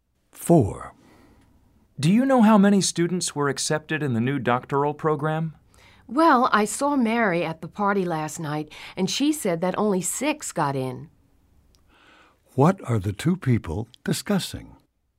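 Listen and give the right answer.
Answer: How many students were accepted into the new doctoral program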